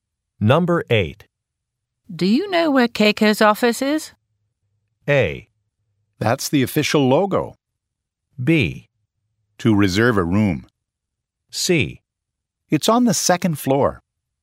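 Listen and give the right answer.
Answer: C: It's on the second floor.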